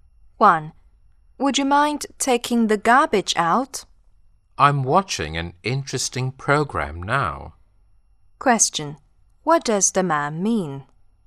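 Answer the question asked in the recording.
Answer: He can't take the garbage out now because he is watching an interesting program.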